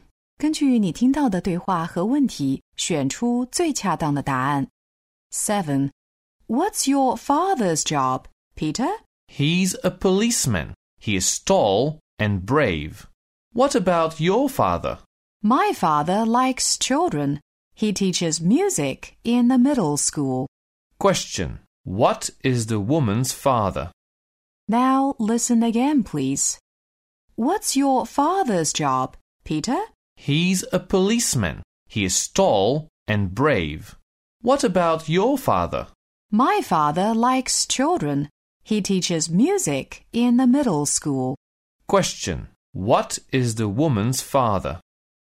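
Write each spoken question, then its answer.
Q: What is the woman's father?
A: A music teacher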